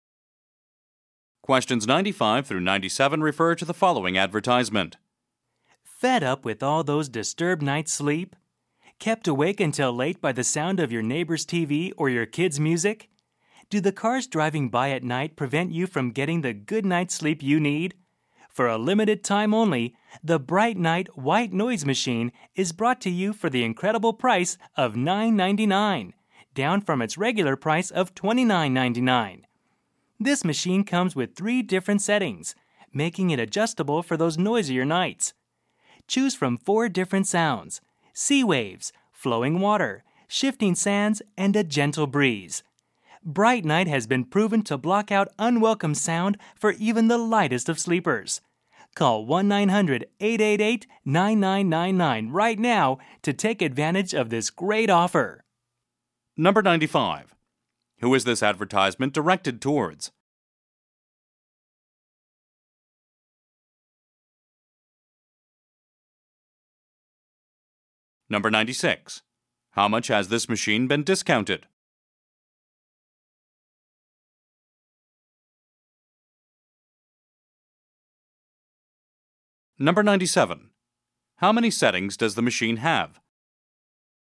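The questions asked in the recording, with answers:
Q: Who is this advertisement directed towards?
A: People who have trouble sleeping because of noise

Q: How much has this machine been discounted?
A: $20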